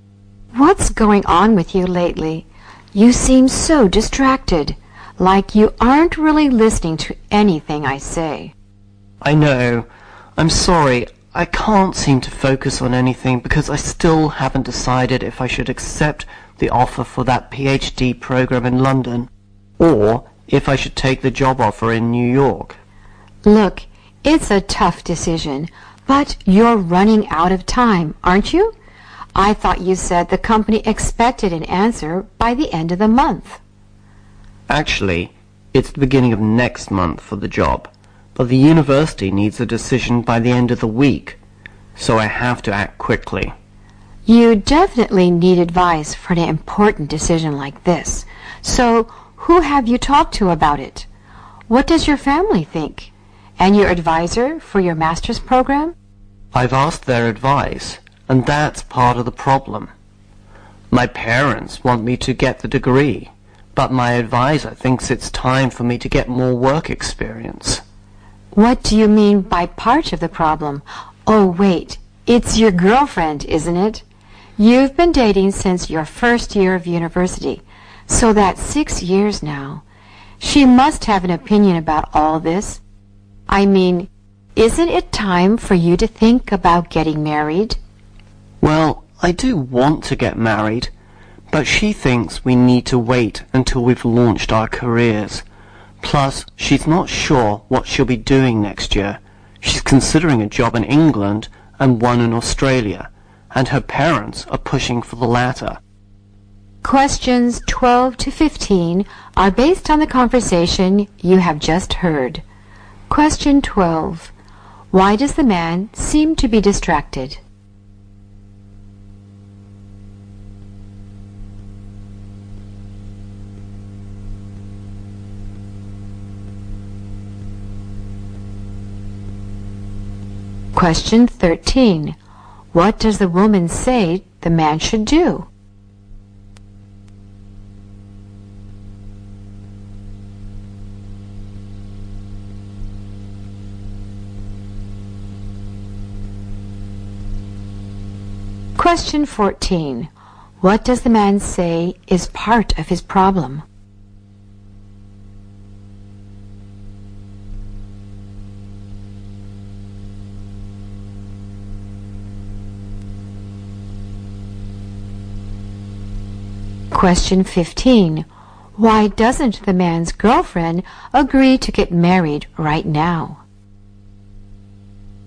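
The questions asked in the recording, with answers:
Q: Why does the man seem to be distracted?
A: He can't decide between a PhD offer in London and a job offer in New York.

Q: What does the man say is part of his problem?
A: His parents and his advisor give different advice.

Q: Why doesn't the man's girlfriend agree to get married right now?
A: She thinks they should wait until they've launched their careers.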